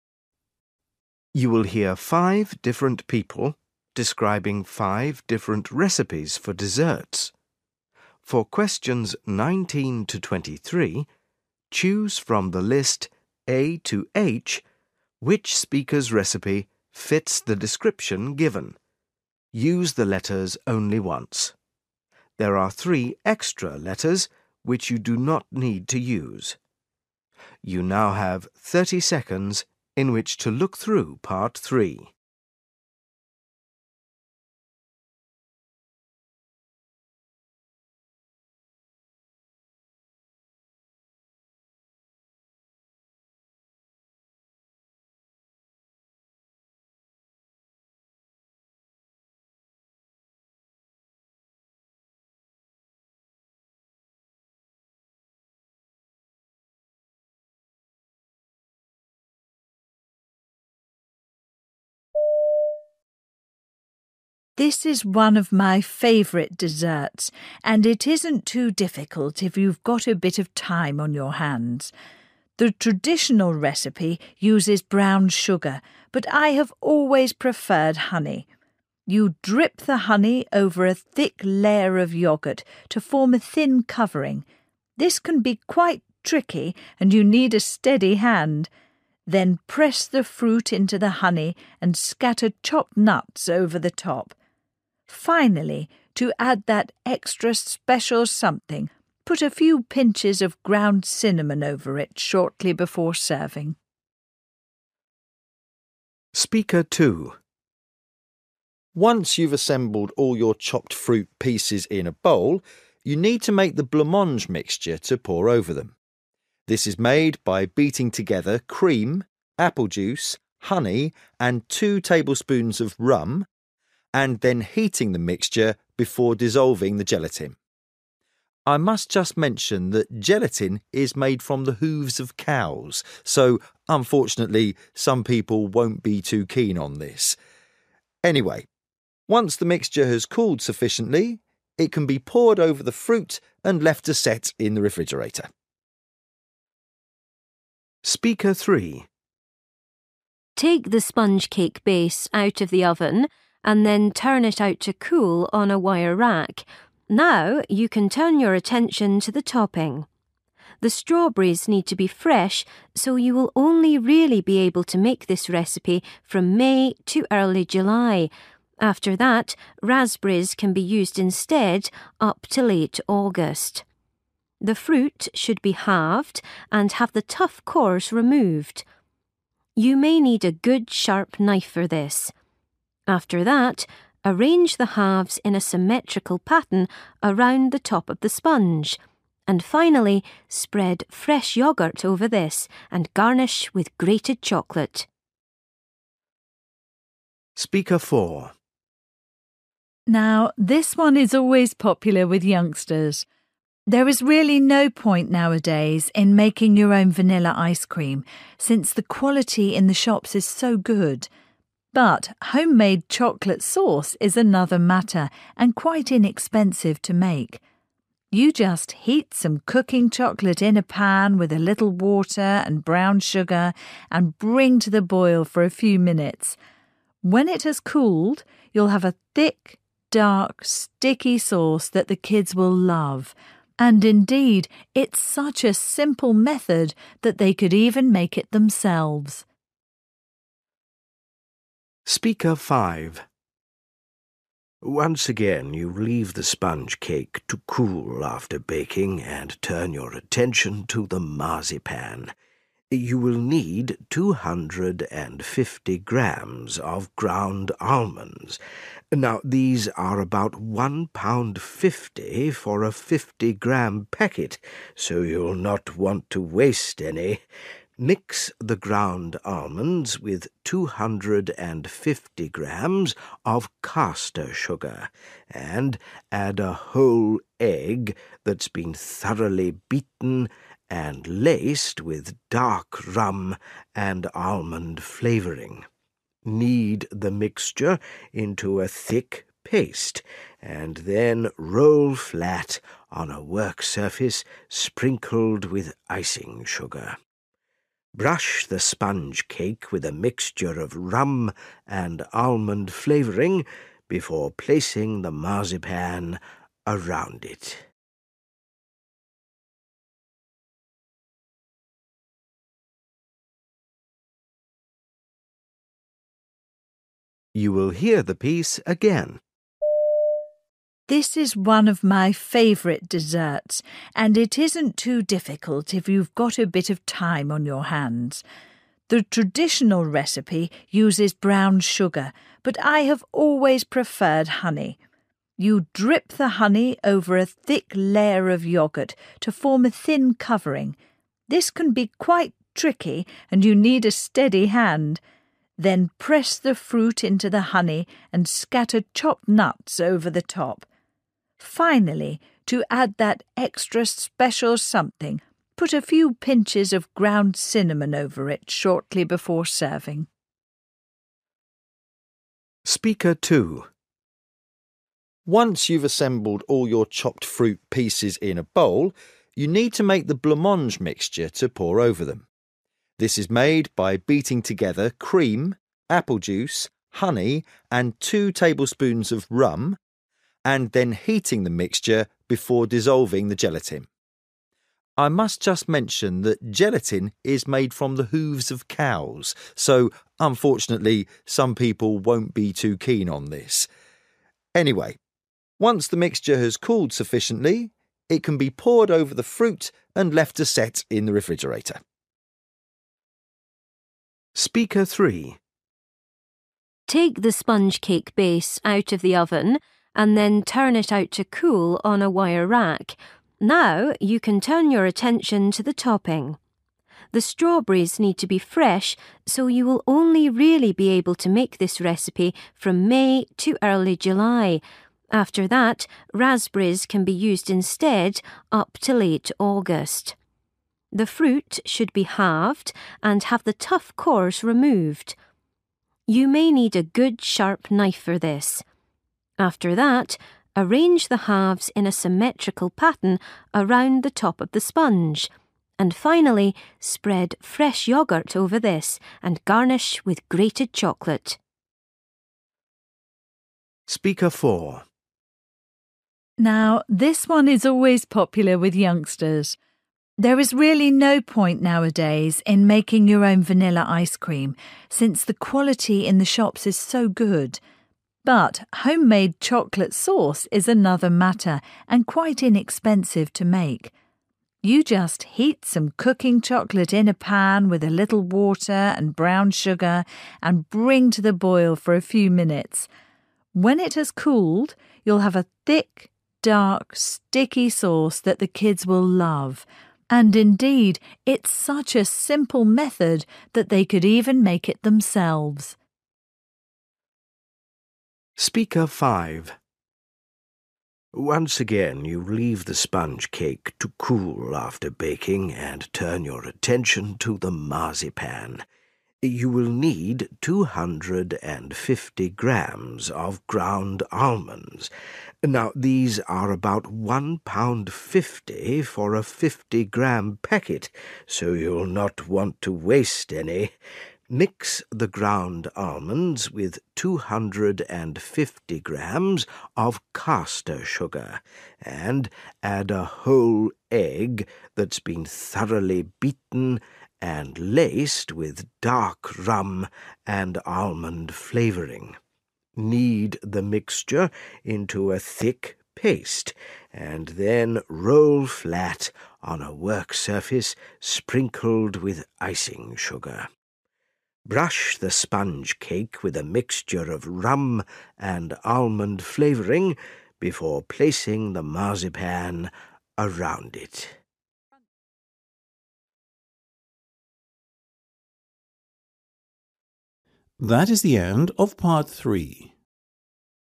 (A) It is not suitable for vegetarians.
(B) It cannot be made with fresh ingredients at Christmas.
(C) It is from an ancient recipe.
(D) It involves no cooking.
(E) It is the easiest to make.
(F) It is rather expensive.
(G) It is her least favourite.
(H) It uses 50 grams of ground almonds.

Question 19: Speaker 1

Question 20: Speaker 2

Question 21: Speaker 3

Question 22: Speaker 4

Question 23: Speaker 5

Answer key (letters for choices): 19D, 20A, 21B, 22E, 23F

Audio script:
This is one of my favourite desserts and it isn't too difficult if you've got a bit of time on your hands. The traditional recipe uses brown sugar but I have always preferred honey. You drip the honey over a thick layer of yoghurt to form a thin covering. This can be quite tricky and you need a steady hand. Then press the fruit into the honey and scatter chopped nuts over the top. Finally, to add that extra special something, put a few pinches of ground cinnamon over it shortly before serving.
Once you've assembled all your chopped fruit pieces in a bowl, you need to make the blancmange mixture to pour over them. This is made by beating together cream, apple juice, honey and two table spoons of rum, and then heating the mixture before dissolving the gelatin. I must just mention that gelatin is made from the hooves of cows so, unfortunately, some people won't be too keen on this. Anyway, once the mixture has cooled sufficiently, it can be poured over the fruit and left to set in the refrigerator.
Take the sponge cake base out of the oven and then turn it out to cool on a wire rack. Now, you can turn your attention to the topping. The strawberries need to be fresh so you will only really be able to make this recipe from May to early July; after that, raspberries can be used instead, up to late August. The fruit should be halved and have the tough cores removed. You may need a good sharp knife for this. After that, arrange the halves in a symmetrical pattern around the top of the sponge and finally spread fresh yoghurt over this and garnish with grated chocolate.
Now, this one is always popular with youngsters. There is really no point nowadays in making your own vanilla ice-cream since the quality in the shops is so good. But home-made chocolate sauce is another matter and quite inexpensive to make. You just heat some cooking chocolate in a pan with a little water and brown sugar and bring to the boil for a few minutes. When it has cooled, you'll have a thick, dark, sticky sauce that the kids will love ... and indeed it's such a simple method that they could even make it themselves.
Once again you leave the sponge cake to cool after baking and turn your attention to the marzipan. You will need 250 grams of ground almonds. Now, these are about one pound fifty for a fifty gram packet, so you'll not want to waste any. Mix the ground almonds with 250 grams of castor sugar and, add a whole egg that's been thoroughly beaten and laced with dark rum and almond flavouring, knead the mixture into a thick paste and then roll flat on a work-surface sprinkled with icing sugar. Brush the sponge cake with a mixture of rum and almond flavouring before placing the marzipan around it.